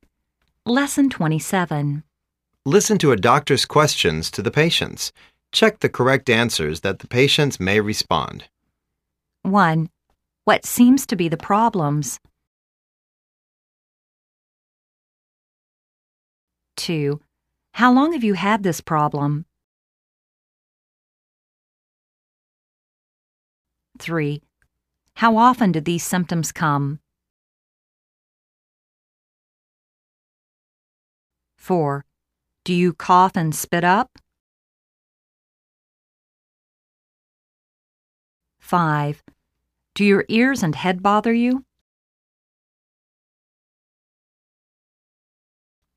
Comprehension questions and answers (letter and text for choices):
Listen to a doctor's questions to the patients.check the correct answers that the patients may respons.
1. What seems to be the problems?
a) l'm feeling cold and tired. It seems l'm going to have a fever.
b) It has been a week long.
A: a) l'm feeling cold and tired. It seems l'm going to have a fever.

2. How long have you had this problem?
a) lt's already three days.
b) I had about four or five times cough every hour.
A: a) lt's already three days.

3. How often do these symptoms come?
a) For five days.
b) About every four hours.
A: b) About every four hours.

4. Do you cough and spit up?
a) Yes. I cough and spit up yellowish phlegm.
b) Yes. l'm cold and upset.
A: a) Yes. I cough and spit up yellowish phlegm.

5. Do your ears and head bother you?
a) I don't bother about my ears and head.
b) I think so. I had a slight feeling of headache. But, my ears are fine.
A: b) I think so. I had a slight feeling of headache. But, my ears are fine.